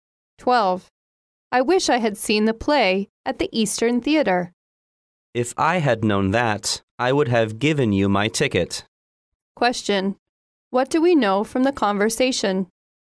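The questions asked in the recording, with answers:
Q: What do we know from the conversation?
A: The woman didn't see the play; the man would have given her his ticket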